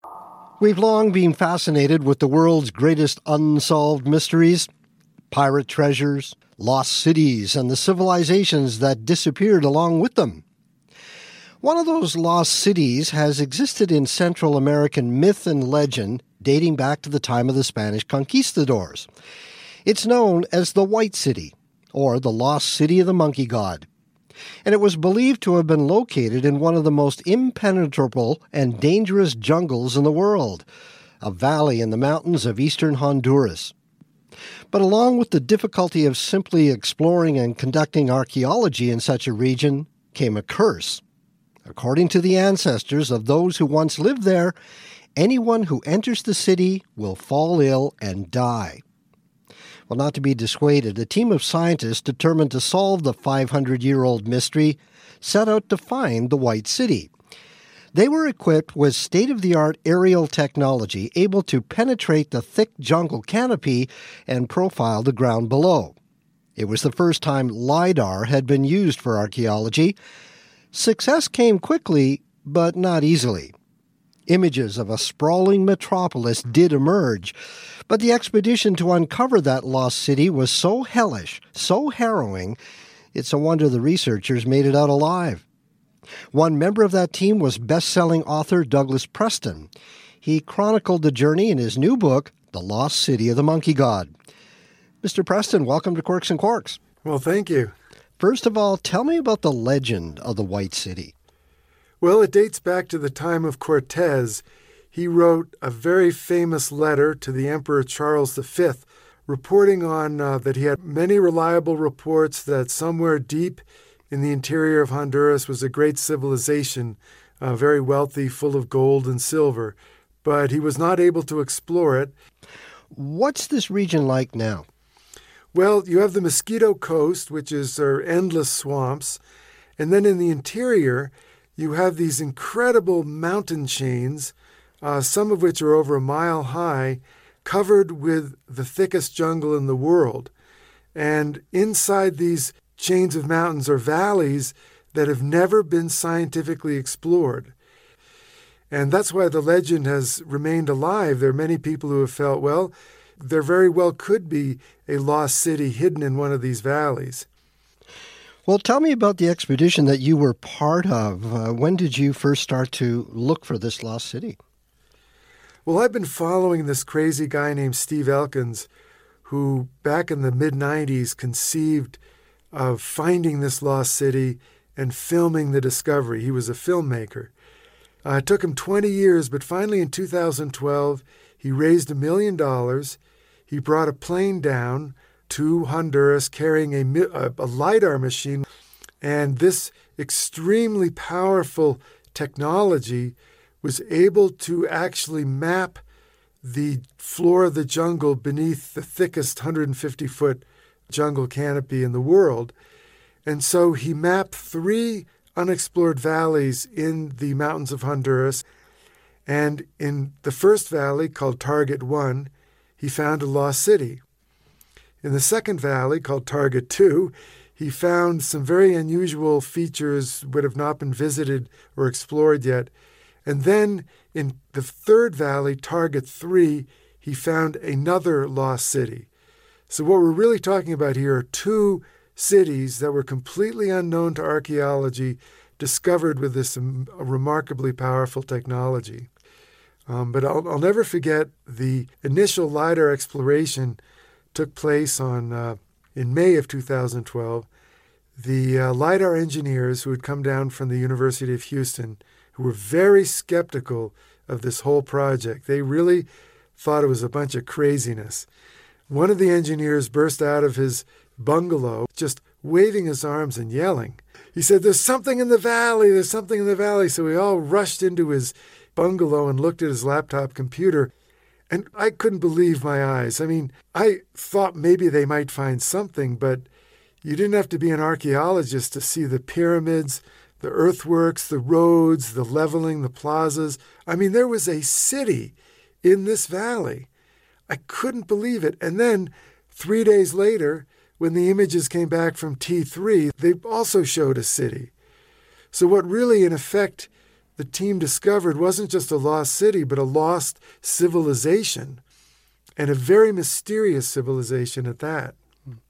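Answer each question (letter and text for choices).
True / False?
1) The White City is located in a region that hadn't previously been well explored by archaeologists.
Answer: True

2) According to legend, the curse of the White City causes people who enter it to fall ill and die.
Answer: True

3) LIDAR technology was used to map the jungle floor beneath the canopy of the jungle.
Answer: True

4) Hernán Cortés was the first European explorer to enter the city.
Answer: False

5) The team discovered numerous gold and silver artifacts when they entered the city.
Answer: False

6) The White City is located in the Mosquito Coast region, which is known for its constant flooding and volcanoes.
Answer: False

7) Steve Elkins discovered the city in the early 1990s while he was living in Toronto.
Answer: False

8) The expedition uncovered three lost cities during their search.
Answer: False

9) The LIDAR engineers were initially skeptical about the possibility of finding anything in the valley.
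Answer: True

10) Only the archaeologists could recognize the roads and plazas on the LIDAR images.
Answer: False

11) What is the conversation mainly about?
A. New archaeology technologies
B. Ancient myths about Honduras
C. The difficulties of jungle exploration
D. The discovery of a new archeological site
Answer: D. The discovery of a new archeological site

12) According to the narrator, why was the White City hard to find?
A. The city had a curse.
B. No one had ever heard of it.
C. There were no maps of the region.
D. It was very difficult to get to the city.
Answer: D. It was very difficult to get to the city.

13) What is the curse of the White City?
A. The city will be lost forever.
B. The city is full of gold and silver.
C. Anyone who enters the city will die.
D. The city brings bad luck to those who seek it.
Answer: C. Anyone who enters the city will die.

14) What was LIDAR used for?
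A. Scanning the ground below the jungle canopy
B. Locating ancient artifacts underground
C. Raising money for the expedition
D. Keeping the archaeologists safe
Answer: A. Scanning the ground below the jungle canopy

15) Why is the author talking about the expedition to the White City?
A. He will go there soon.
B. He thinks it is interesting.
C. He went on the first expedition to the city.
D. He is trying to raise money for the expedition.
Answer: C. He went on the first expedition to the city.

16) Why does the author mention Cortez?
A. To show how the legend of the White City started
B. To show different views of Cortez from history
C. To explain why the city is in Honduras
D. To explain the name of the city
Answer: A. To show how the legend of the White City started

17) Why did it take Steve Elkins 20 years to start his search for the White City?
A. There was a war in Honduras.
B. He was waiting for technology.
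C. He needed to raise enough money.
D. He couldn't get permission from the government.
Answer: C. He needed to raise enough money.

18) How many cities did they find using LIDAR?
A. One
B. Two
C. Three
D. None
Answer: B. Two

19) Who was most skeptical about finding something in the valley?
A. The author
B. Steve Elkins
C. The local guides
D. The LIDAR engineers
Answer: D. The LIDAR engineers

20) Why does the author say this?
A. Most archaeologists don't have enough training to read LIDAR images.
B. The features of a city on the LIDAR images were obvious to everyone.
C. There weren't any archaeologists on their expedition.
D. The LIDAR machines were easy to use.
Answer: B. The features of a city on the LIDAR images were obvious to everyone.

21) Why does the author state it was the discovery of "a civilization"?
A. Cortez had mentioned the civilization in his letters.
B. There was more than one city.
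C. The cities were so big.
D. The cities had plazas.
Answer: B. There was more than one city.

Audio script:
We've long been fascinated with the world's greatest unsolved mysteries - pirate treasures, lost cities and the civilizations that disappeared along with them. One of those lost cities has existed in Central American myth and legend dating back to the time of the Spanish conquistadores. It's known as the White City or the Lost City of the Monkey God. And it was believed to have been located in one of the most impenetrable and dangerous jungles in the world, a valley in the mountains of eastern Honduras.
But along with the difficulty of simply exploring and conducting archaeology in such a region came a curse. According to the ancestors of those who once lived there, anyone who enters the city will fall ill and die.
Well not to be dissuaded, a team of scientists determined to solve the 500-year-old mystery set out to find the white city.
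They were equipped with state-of-the-art aerial technology able to penetrate the thick jungle canopy and profile the ground below. It was the first time LIDAR had been used for archeology.
Success came quickly but not easily. Images of a sprawling metropolis did emerge, but the expedition to uncover that lost city was so hellish, so harrowing, it's a wonder the researchers made it out alive.
One member of that team was best-selling author Douglas Preston. He chronicled the journey in his new book The Lost City of the Monkey God. Mr. Preston welcome to Quirks and Quarks.
Well, thank you.
First of all, tell me about the legend of the White City.
Well, it dates back to the time of Cortez. He wrote a very famous letter to the Emperor Charles the Fifth, reporting on that he had many reliable reports that somewhere deep in the interior of Honduras was a great civilization, very wealthy full of gold and silver. 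But he was not able to explore it.
What's this region like now?
Well, you have the Mosquito Coast, which are endless swamps. And then in the interior, you have these incredible mountain chains, some of which are over a mile high covered with the thickest jungle in the world. And inside these chains of mountains are valleys that have never been scientifically explored. And that's where the legend has remained alive. There are many people who have felt, well, there very well could be a lost city hidden in one of these valleys.
Well, tell me about the expedition that you were part of. When did you first start to look for this lost city?
Well, I've been following this crazy guy named Steve Elkins, who back in the mid-90s conceived of finding this lost city and filming the discovery. He was a filmmaker.
It took him 20 years, but finally in 2012, he raised a million dollars. He brought a plane down to Honduras carrying a LIDAR machine. 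And this extremely powerful technology was able to actually map the floor of the jungle beneath the thickest 150-foot jungle canopy in the world.
And so he mapped three unexplored valleys in the mountains of Honduras. And in the first valley, called Target One, he found a lost city. In the second valley, called Target Two, he found some very unusual features which have not been visited or explored yet. And then in the third valley, Target Three, he found another lost city. So we're really talking about here are two cities that were completely unknown to archaeology discovered with this remarkably powerful technology.
But I'll never forget the initial LIDAR exploration (that) took place on in May of 2012. The LIDAR engineers, who had come down from the University of Houston, who were very skeptical of this whole project. They really thought it was a bunch of craziness. One of the engineers burst out of his bungalow just waving his arms and yelling. 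He said, "There's something in the valley! There's something in the valley!" So we all rushed into his bungalow and looked at his laptop computer.
And I couldn't believe my eyes. I mean I thought maybe they might find something, but you didn't have to be an archaeologist to see the pyramids, the earthworks, the roads, the leveling, the plazas. I mean there was a city in this valley.
And then, three days later, when the images came back from T-3, they also showed a city. So what really in effect the team discovered wasn't just the lost city but a lost civilization and a very mysterious civilization at that.

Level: TOEFL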